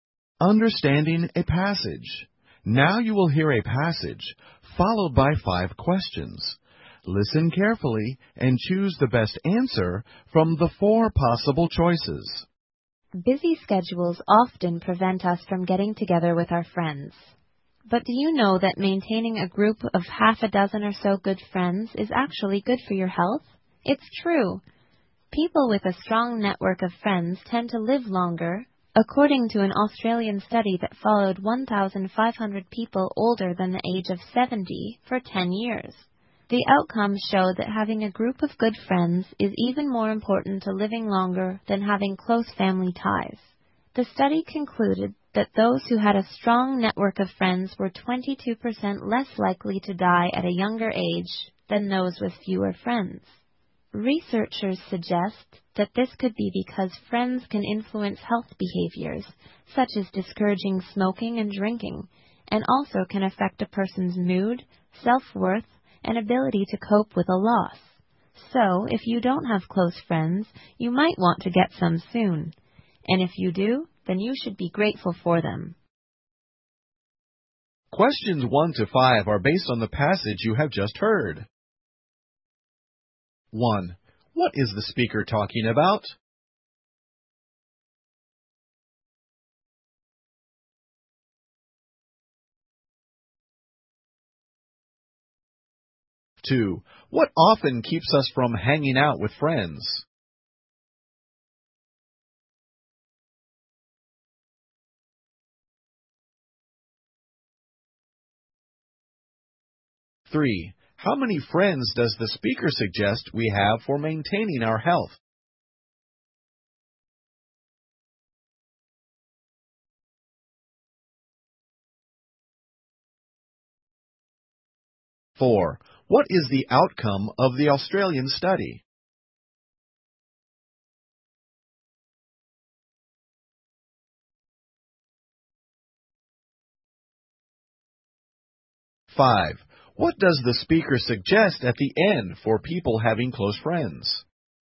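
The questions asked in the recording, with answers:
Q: What is the speaker talking about?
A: Friends are good for health

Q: What often keeps us from hanging out with friends?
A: Busy schedules

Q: How many friends does the speaker suggest we have for maintaining our health?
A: About half a dozen (six)

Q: What is the outcome of the Australian study?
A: A group of good friends matters more for living longer than close family ties

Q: What does the speaker suggest at the end for people having close friends?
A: Be grateful for them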